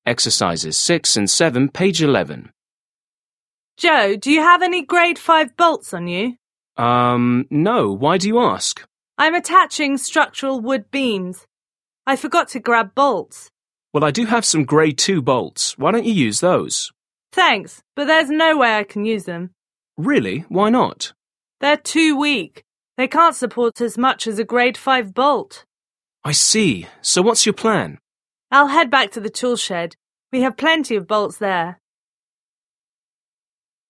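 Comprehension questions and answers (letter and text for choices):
6. Listen to a conversation between two construction workers. Choose the correct answers.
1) What problem do the workers discuss?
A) They need small bolts.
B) They need different grade bolts.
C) They cannot find the right size nuts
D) They used the wrong size bolts.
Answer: B) They need different grade bolts.

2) What will the woman likely do next?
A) recturn to the tool shed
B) take the man's bolts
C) purchase new bolts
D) attach the beams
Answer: A) recturn to the tool shed

7. Listen again and complete the conversation.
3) Worker 1: Joe, do you have any grade five bolts 1 __________?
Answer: on you

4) I'm attaching structural wood beams. I 2___________ bolts.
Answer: forgot to grab

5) Well, I do have some grade two bolts. 3 _____________use those?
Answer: Why don't you

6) Thanks, but there's 4 __________I can use them.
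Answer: no way

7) Really? 5____________ ?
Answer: Why not

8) They're too weak. They can't support 6__________ a grade five bolt.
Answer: as much as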